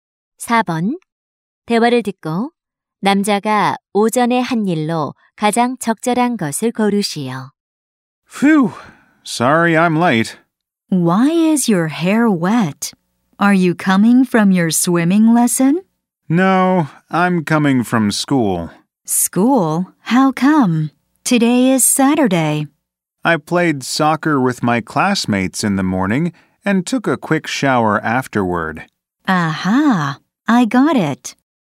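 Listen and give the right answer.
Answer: 반 친구들과 축구하기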